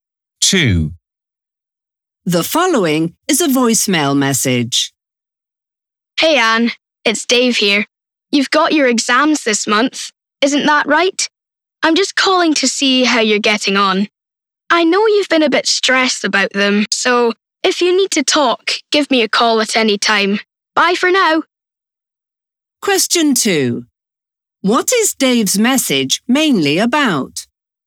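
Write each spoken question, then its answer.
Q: What is Dave's message mainly about?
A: Checking on how Anne is getting on with her exams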